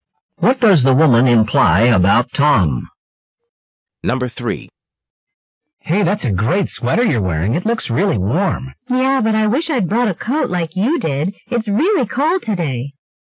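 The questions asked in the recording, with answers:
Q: What does the woman imply?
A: She is cold because she didn't bring a coat.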